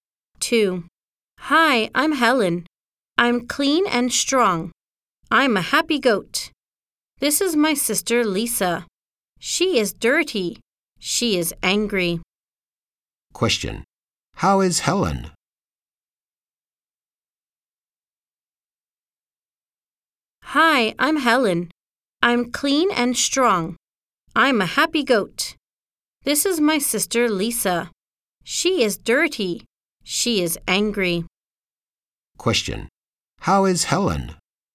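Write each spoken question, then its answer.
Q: How is Helen?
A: She's clean and strong.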